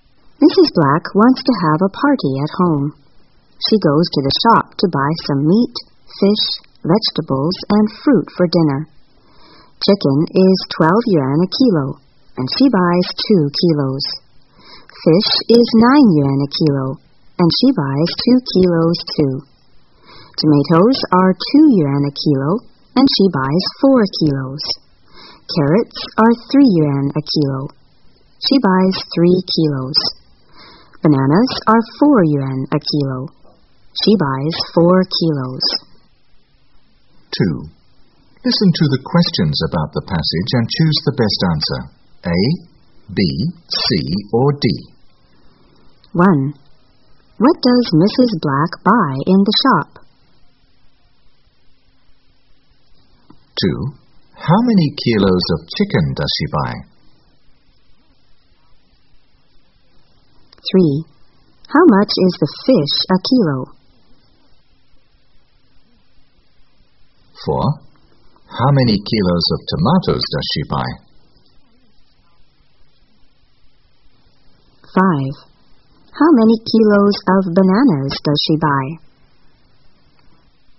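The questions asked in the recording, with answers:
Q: What does Mrs. Black buy in the shop?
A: Meat, fish, vegetables and fruit

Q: How many kilos of chicken does she buy?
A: 2 kilos

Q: How much is the fish a kilo?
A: 9 yuan

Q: How many kilos of tomatoes does she buy?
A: 4 kilos

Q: How many kilos of bananas does she buy?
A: 4 kilos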